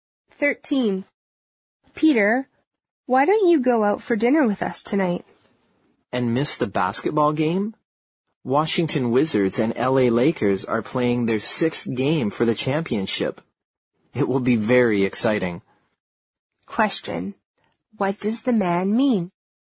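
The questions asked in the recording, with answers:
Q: What does the man mean?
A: He won't go to dinner because he wants to watch the basketball game.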